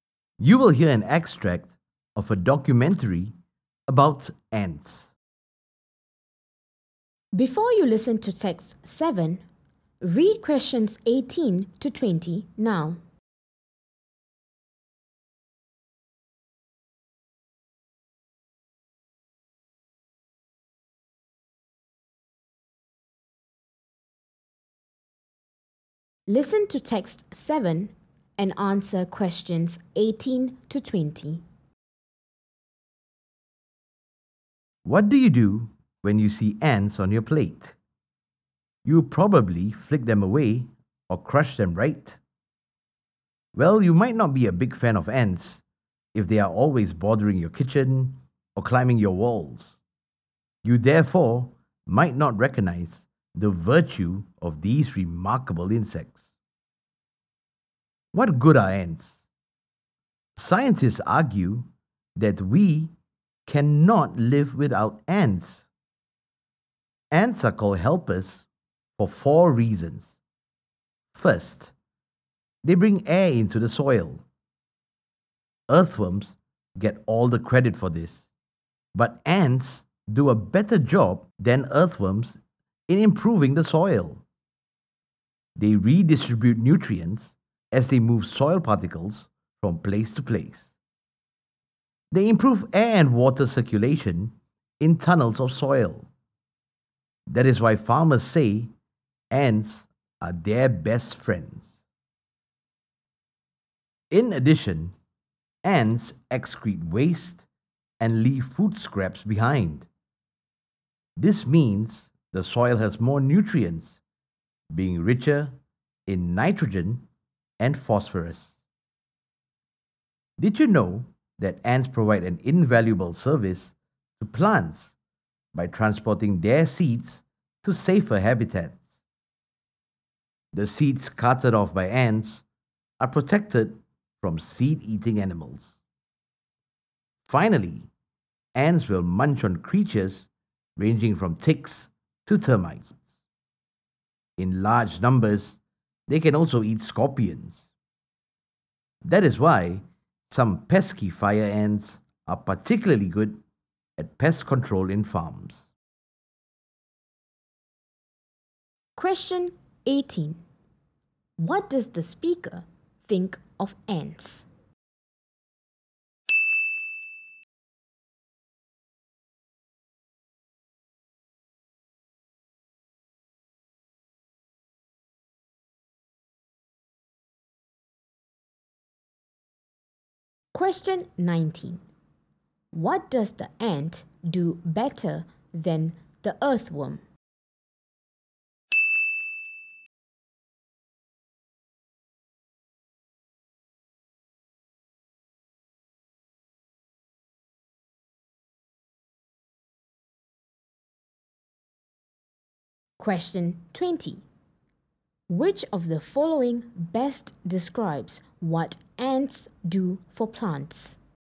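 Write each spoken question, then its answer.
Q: What does the ant do better than the earthworm?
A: Improving the soil

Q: Which of the following best describes what ants do for plants?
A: They carry plant seeds to safer places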